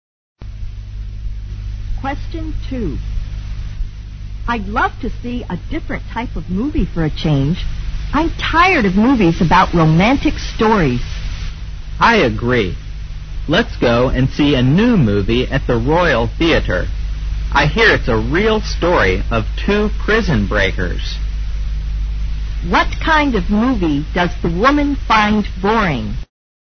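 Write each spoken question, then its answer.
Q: What kind of movie does the woman find boring?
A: Romantic movies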